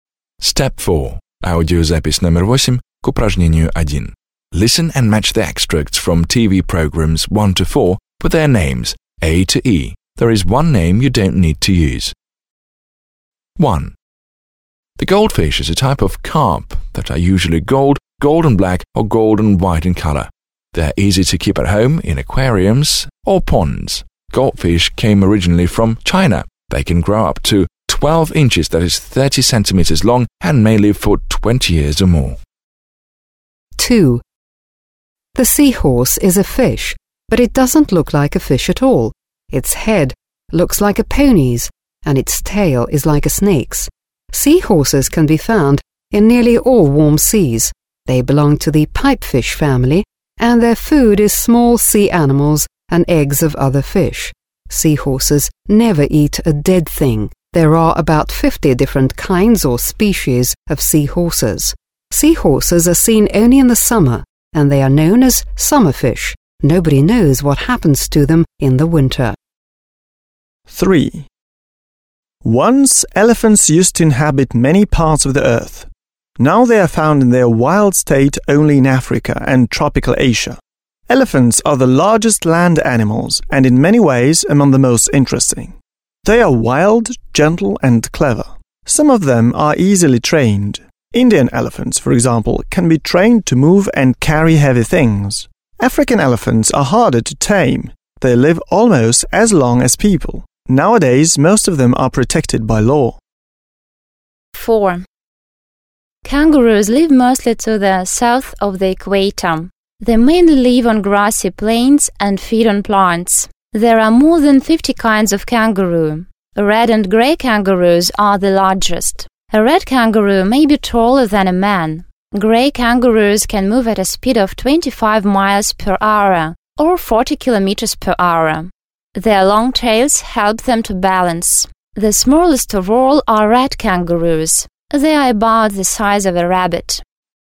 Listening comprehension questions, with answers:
1. Послушайте и сопоставьте отрывки из телепрограмм (A-D) с их названиями (a-e) и изображениями (1-5). Есть одно название и одно изображение, которые вам не нужно использовать.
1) Wildlife: the Kind Giants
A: текст 3

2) Fauna: Animals of Australia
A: текст 4

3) Everything You Want to Know about the Horse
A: лишнее

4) Our Pets: What Do We Know about Them?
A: текст 1

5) Secrets of the Underwater World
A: текст 2

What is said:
1) The goldfish is a type of carp that are usually gold, gold and black, or gold and white in colour. They are easy to keep at home in aquariums or ponds. Goldfish originally came from China. They can grow up to 12 inches (30 cm) long and may live for 20 years or more.
2) The sea horse is a fish, but it doesn't look like a fish at all. Its head looks like a pony's, and its tail is like a snake's. Sea horses can be found in nearly all warm seas. They belong to the pipefish family, and their food is small sea animals and eggs of other fish. Sea horses never eat dead things. There are about 50 different species of sea horses. Sea horses are seen only in the summer and they are known as summer fish. Nobody knows what happens to them in the winter.
3) Once elephants used to inhabit many parts of the Earth. Now they are found in their wild state only in Africa and tropical Asia. Elephants are the largest land animals, and in many ways, among the most interesting. They are wild, gentle and clever. Some of them are easily trained. Indian elephants, for example, can be trained to move and carry heavy things. African elephants are harder to tame. They live almost as long as people. Nowadays most of them are protected by law.
4) Kangaroos live mostly to the south of the equator. They mainly live on grassy plains and feed on plants. There are more than 50 kinds of kangaroo. Red and grey kangaroos are the largest. A red kangaroo can be taller than a man. Grey kangaroos can move at a speed of 25 miles per hour, or 40 km per hour. Their long tails help them to balance. The smallest of all are rat kangaroos. They are about the size of a rabbit.

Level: 9 класс